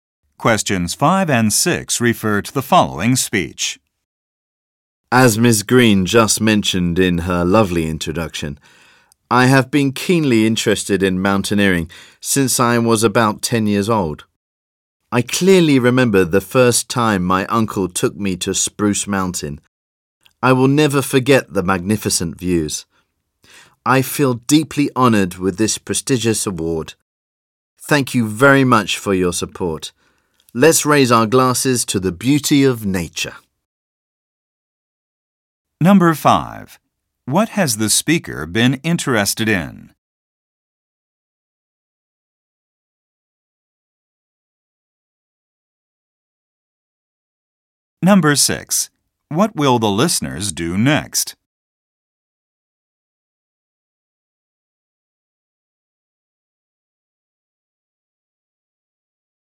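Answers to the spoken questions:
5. Mountaineering
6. Raise their glasses for a toast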